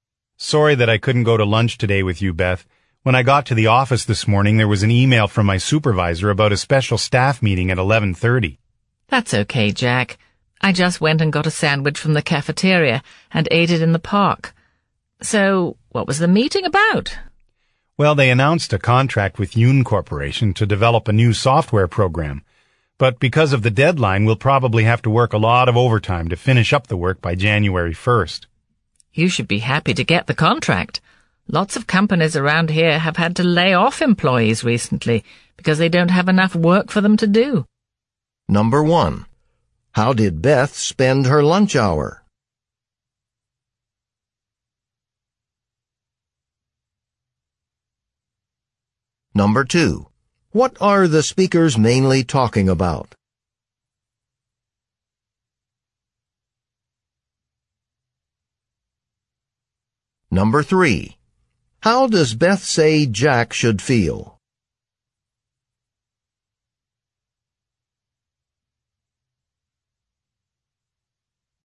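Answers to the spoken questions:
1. She got a sandwich from the cafeteria and ate it in the park.
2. A staff meeting about a new software contract with Yoon Corporation.
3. Happy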